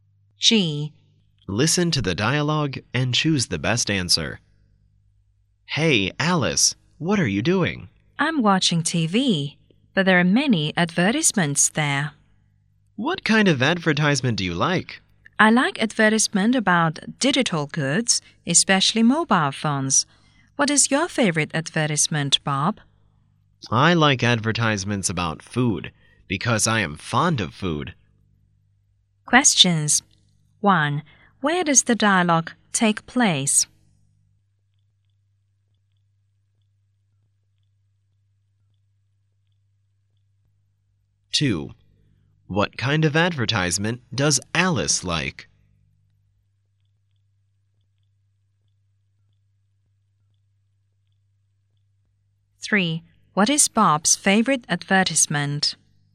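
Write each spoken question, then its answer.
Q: What kind of advertisement does Alice like?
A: Ads for digital goods, especially mobile phones.

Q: What is Bob's favorite advertisement?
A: Ads about food.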